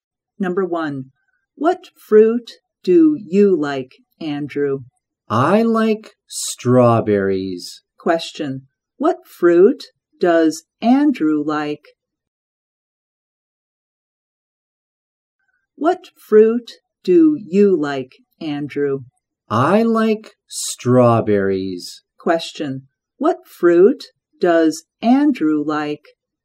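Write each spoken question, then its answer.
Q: what fruit does Andrew like?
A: Strawberries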